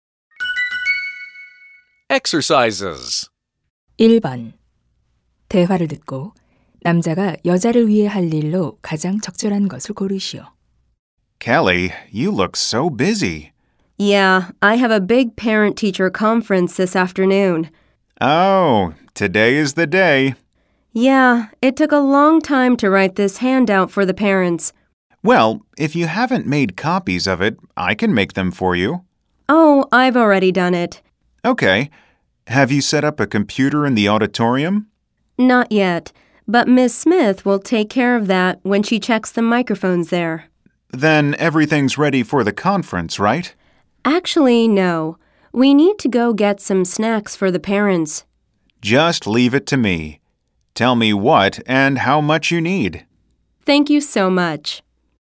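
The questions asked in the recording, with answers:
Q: 대화를 듣고 남자가 여자를 위해 할 일로 가장 적절한 것을 고르시오.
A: 학부모용 간식 사 오기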